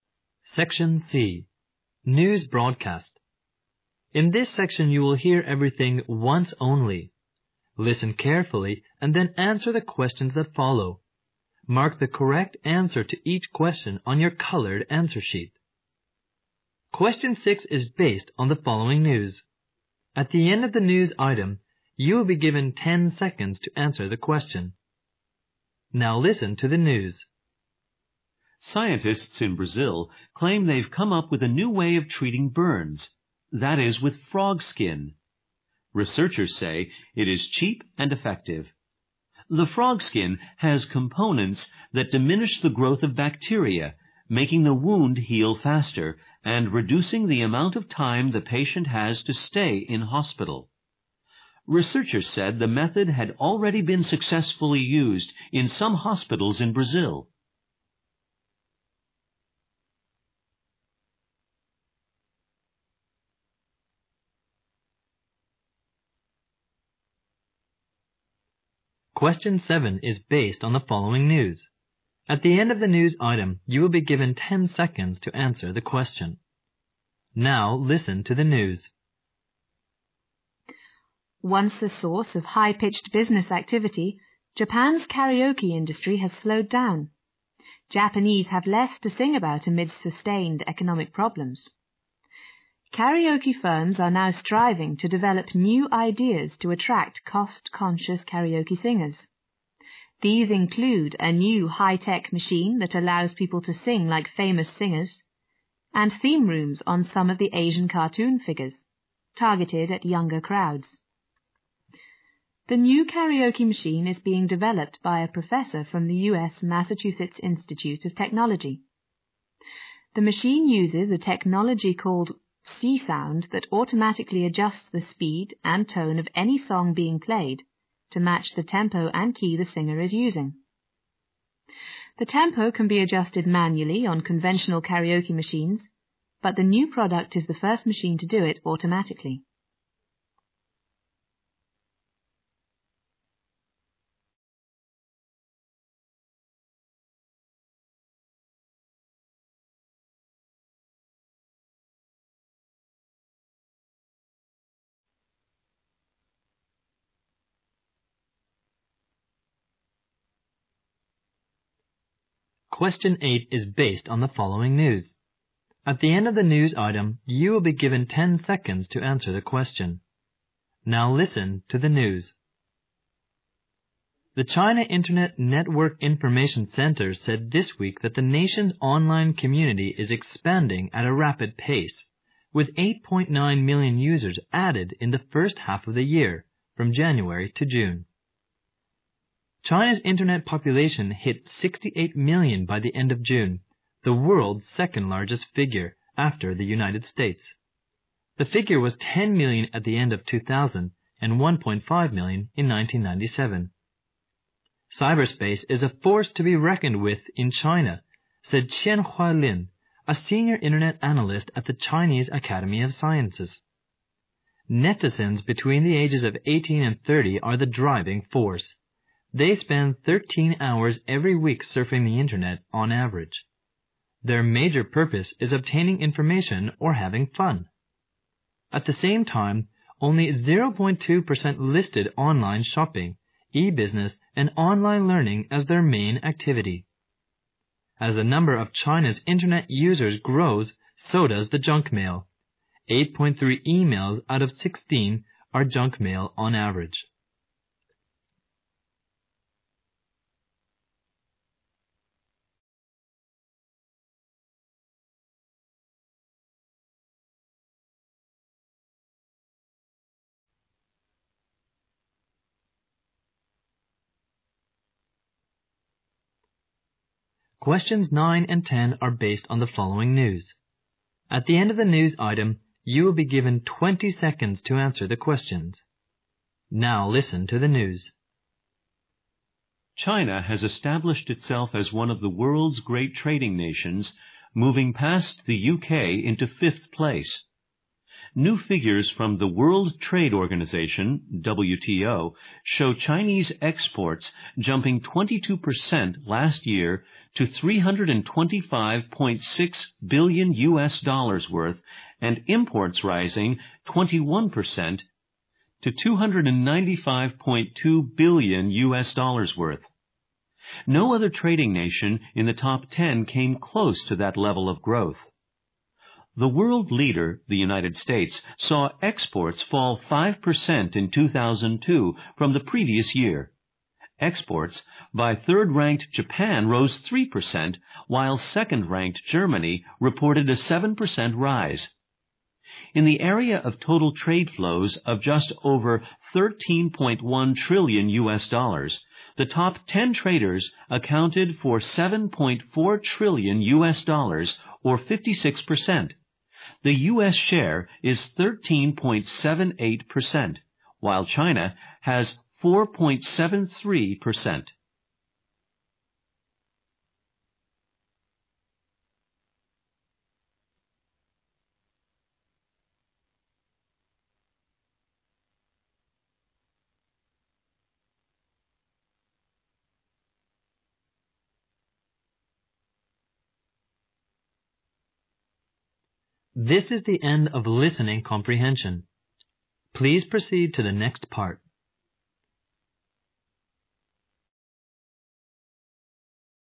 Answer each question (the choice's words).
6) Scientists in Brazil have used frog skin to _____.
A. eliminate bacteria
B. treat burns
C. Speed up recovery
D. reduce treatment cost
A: treat burns

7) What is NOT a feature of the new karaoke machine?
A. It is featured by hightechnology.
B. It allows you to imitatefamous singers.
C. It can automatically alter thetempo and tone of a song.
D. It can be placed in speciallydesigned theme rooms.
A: It can be placed in speciallydesigned theme rooms.

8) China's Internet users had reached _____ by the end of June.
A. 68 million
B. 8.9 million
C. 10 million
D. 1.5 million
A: 68 million

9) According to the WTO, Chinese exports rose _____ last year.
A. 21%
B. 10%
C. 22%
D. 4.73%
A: 22%

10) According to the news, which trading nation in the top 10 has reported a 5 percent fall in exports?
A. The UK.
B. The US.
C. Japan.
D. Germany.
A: The US.

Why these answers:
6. 细节题。录音首句就提到"巴西科学家声称,找到了对付烧伤的新方法",随后提出该新方法是"利用青蛙皮",故选B项"巴西科学家利用青蛙皮治疗烧伤"。
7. 细节题。录音中提到新卡拉ok的特点有:采用了高新技术(high-tech),使年轻人能"singlike famous singers"(如著名歌唱家一样歌唱),并能"automatically adjustthe speed and tone of any song"(自动调整任何歌曲的速度和声调),D项的内容在文中未提到。
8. 细节题。录音中明确指出"China's internetpopulation hit 68 million by the end of June",A项正确。
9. 细节题。文中提到"China's exports jumped 22 percent last year"(中国的出口去年猛增了22%),故选C项。
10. 细节题。录音中在谈论位居世界前10名的国家贸易状况时,指出"the United States, sawits exports fall 5 percent",故选A项。

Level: GRADE EIGHT